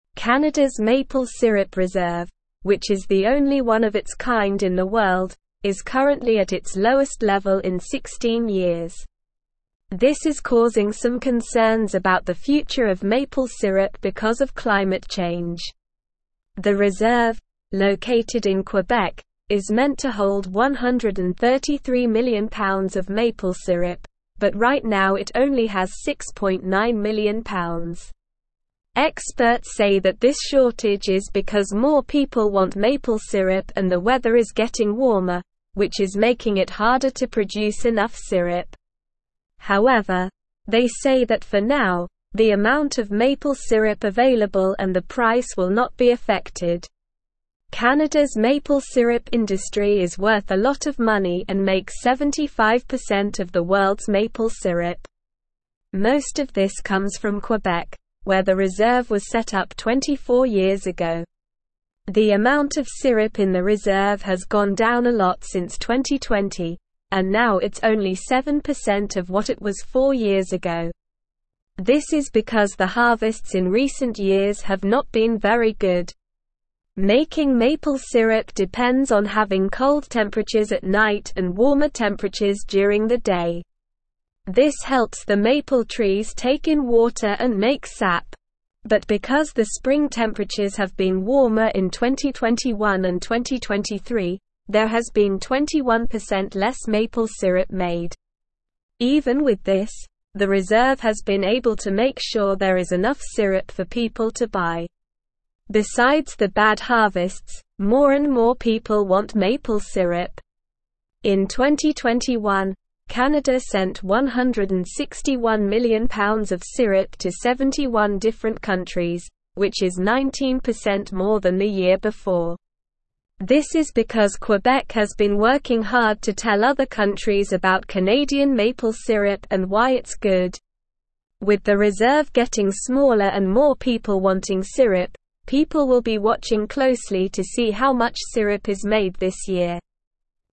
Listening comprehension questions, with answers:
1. Canada's (1)______ syrup (2)______, which is the only one of its kind in the world, is currently at its lowest level in 16 years.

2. Canada's (1)______ syrup (2)______, which is the only one of its kind in the world, is currently at its lowest level in 16 years.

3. This is (3)______ some concerns about the future of maple syrup because of climate (4)______.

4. This is (3)______ some concerns about the future of maple syrup because of climate (4)______.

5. Experts say that this shortage is because more people want maple syrup and the weather is getting warmer, which is (5)______ it harder to produce enough syrup.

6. However, they say that for now, the amount of maple syrup available and the (6)______ will not be (7)______.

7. However, they say that for now, the amount of maple syrup available and the (6)______ will not be (7)______.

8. Most of this (8)______ from Quebec, where the reserve was set up 24 years ago.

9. This is because the (9)______ in recent years have not been very good.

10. Making maple syrup depends on (10)______ cold (11)______ at (12)______ and warmer temperatures during the day.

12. Making maple syrup depends on (10)______ cold (11)______ at (12)______ and warmer temperatures during the day.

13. Besides the bad harvests, more and more (13)______ want maple (14)______.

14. Besides the bad harvests, more and more (13)______ want maple (14)______.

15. In 2021, Canada sent 161 million pounds of syrup to 71 (15)______ countries, which is 19% more than the year before.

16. This is because (16)______ has been working hard to tell other countries about Canadian maple syrup and why it's good.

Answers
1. maple
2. reserve
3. causing
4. change
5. making
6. price
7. affected
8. comes
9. harvests
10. having
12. night
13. people
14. syrup
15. different
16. Quebec

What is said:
Canada's maple syrup reserve, which is the only one of its kind in the world, is currently at its lowest level in 16 years. This is causing some concerns about the future of maple syrup because of climate change. The reserve, located in Quebec, is meant to hold 133 million pounds of maple syrup, but right now it only has 6.9 million pounds. Experts say that this shortage is because more people want maple syrup and the weather is getting warmer, which is making it harder to produce enough syrup. However, they say that for now, the amount of maple syrup available and the price will not be affected.
Canada's maple syrup industry is worth a lot of money and makes 75% of the world's maple syrup. Most of this comes from Quebec, where the reserve was set up 24 years ago. The amount of syrup in the reserve has gone down a lot since 2020, and now it's only 7% of what it was four years ago. This is because the harvests in recent years have not been very good.
Making maple syrup depends on having cold temperatures at night and warmer temperatures during the day. This helps the maple trees take in water and make sap. But because the spring temperatures have been warmer in 2021 and 2023, there has been 21% less maple syrup made. Even with this, the reserve has been able to make sure there is enough syrup for people to buy.
Besides the bad harvests, more and more people want maple syrup. In 2021, Canada sent 161 million pounds of syrup to 71 different countries, which is 19% more than the year before. This is because Quebec has been working hard to tell other countries about Canadian maple syrup and why it's good. With the reserve getting smaller and more people wanting syrup, people will be watching closely to see how much syrup is made this year.

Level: Level 3